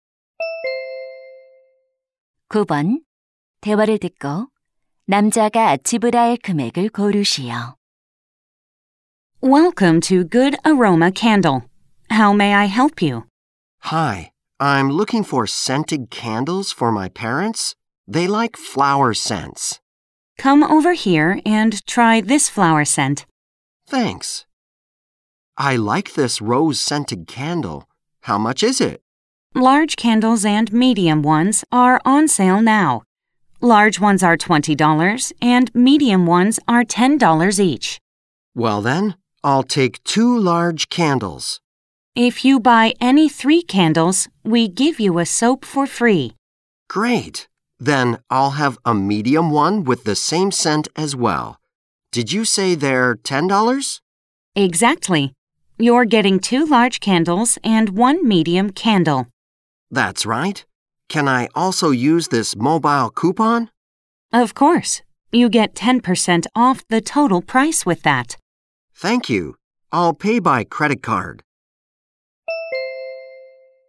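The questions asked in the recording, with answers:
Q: 대화를 듣고 남자가 지불할 금액을 고르시오.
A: $45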